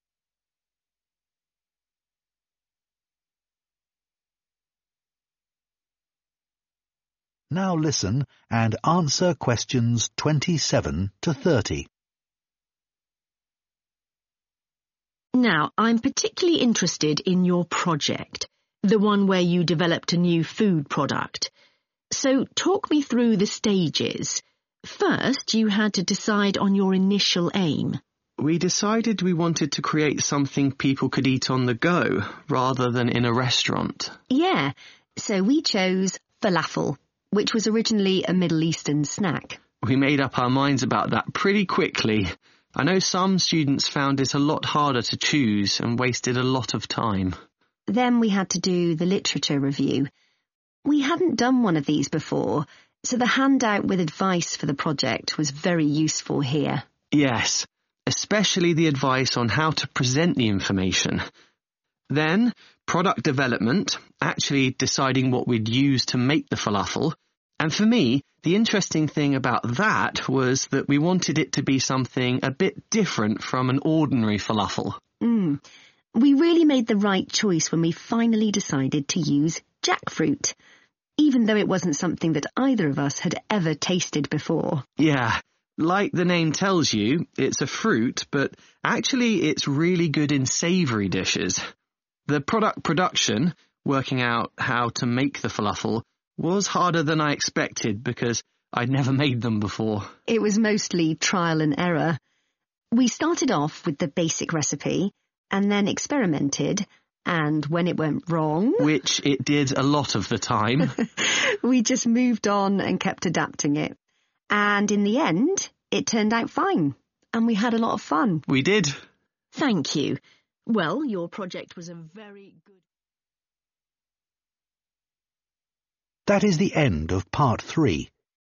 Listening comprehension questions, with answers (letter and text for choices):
Choose FOUR answers from the box and write the correct letter, A–F, next to Questions 27–30.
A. This was challenging but enjoyable.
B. This led to some disagreement.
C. This was easy to decide on.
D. This was helped by the guidelines provided.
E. This seemed like an unnecessary stage.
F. This involved selecting a new ingredient.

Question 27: Initial aim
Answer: C. This was easy to decide on.

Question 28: Literature review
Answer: D. This was helped by the guidelines provided.

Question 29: Product development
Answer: F. This involved selecting a new ingredient.

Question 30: Product production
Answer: A. This was challenging but enjoyable.

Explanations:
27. Bài nghe cho thấy hai sinh viên ngay lập tức thống nhất mục tiêu ban đầu là tạo ra một sản phẩm có thể ăn khi di chuyển, và họ không mất nhiều thời gian để quyết định điều này.
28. Bài nghe cho thấy phần literature review là lần đầu họ thực hiện dạng nhiệm vụ này, và họ được hỗ trợ rất nhiều bởi tài liệu hướng dẫn của dự án, đặc biệt là phần hướng dẫn cách trình bày thông tin.
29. Trong giai đoạn phát triển sản phẩm, họ quyết định sử dụng một nguyên liệu mới là jackfruit, thứ mà cả hai chưa từng thử trước đó.
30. Quá trình sản xuất gặp nhiều khó khăn do phải thử nghiệm nhiều lần, nhưng cuối cùng họ cảm thấy rất vui và hài lòng với kết quả đạt được.

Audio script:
TUTOR: Now, I'm particularly interested in your project, the one where you developed a new food product. So talk me through the stages. First, you had to decide on your initial aim.
FERGUS: We decided we wanted to create something people could eat on the go rather than in a restaurant.
NADIA: Yeah. So we chose falafel, which was originally a Middle Eastern snack.
FERGUS: We made up our minds about that pretty quickly. I know some students found this a lot harder to choose and wasted a lot of time.
NADIA: Then we had to do the literature review. We hadn't done one of these before, so the handout with advice for the project was very useful here.
FERGUS: Yes, especially the advice on how to present the information. Then product development, actually deciding what we'd use to make the falafel, and for me, the interesting thing about that was that we wanted it to be something a bit different from an ordinary falafel.
NADIA: We really made the right choice when we finally decided to use jackfruit, even though it wasn't something that either of us had ever tasted before.
FERGUS: Yeah, like the name tells you, it's a fruit, but actually it's really good in savoury dishes. The product production, working out how to make the falafel, was harder than I expected because I'd never made them before.
NADIA: It was mostly trial and error. We started off with the basic recipe, and then experimented, and when it went wrong...
FERGUS: Which it did a lot of the time...
NADIA: We just moved on and kept adapting it. And in the end, it turned out fine and we had a lot of fun.
FERGUS: We did.
TUTOR: Thank you. Well, your project was very good...